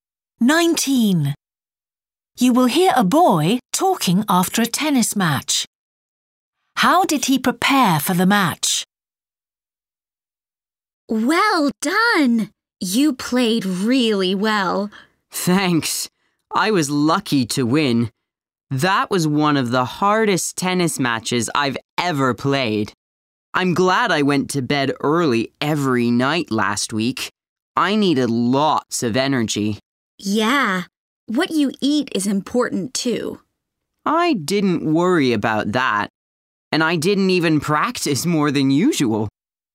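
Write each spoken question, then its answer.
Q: How did he prepare for the match?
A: He went to bed early every night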